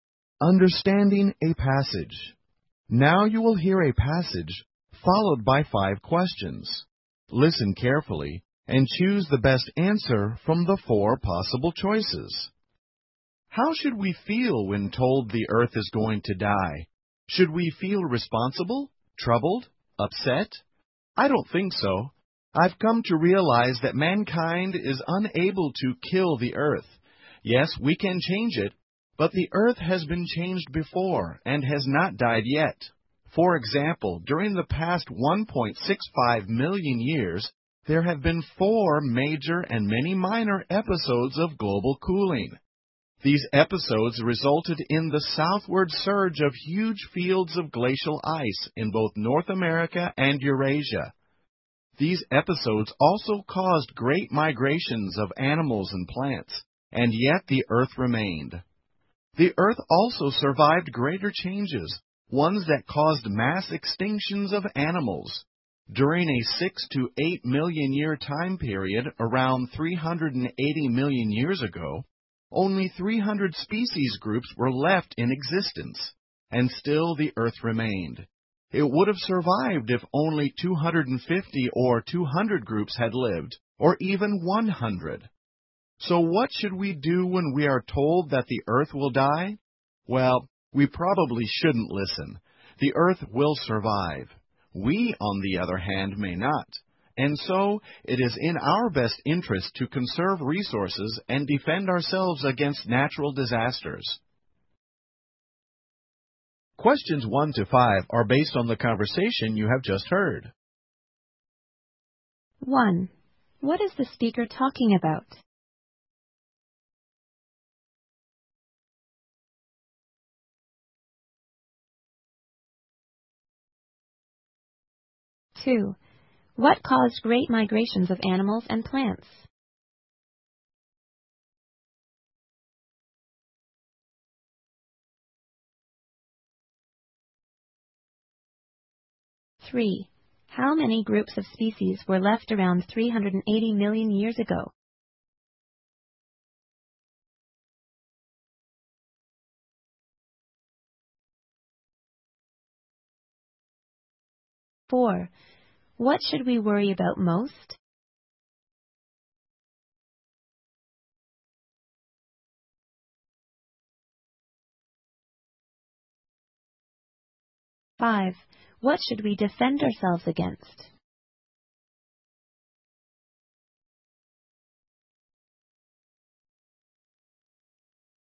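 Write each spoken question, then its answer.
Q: What caused great migrations of animals and plants?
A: Episodes of global cooling

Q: How many groups of species were left around 380 million years ago?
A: 300

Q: What should we defend ourselves against?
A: Natural disasters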